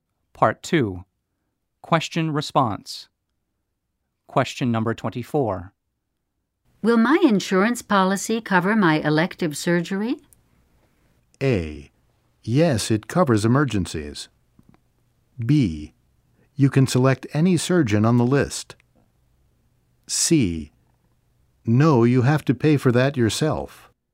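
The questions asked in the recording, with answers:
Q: Will my insurance policy cover my elective surgery?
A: C: No, you have to pay for that yourself.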